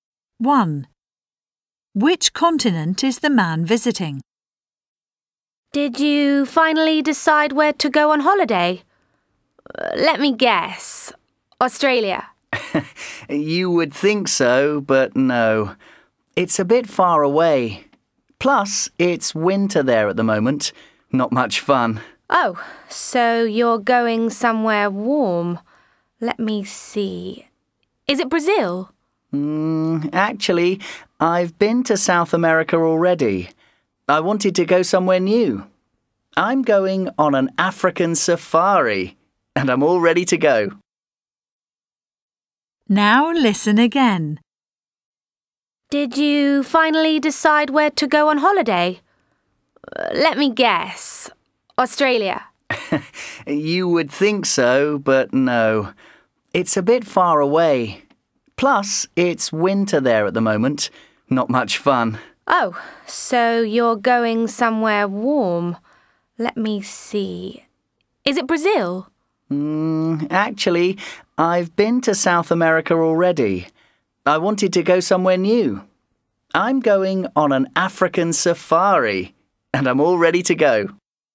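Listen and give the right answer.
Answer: Africa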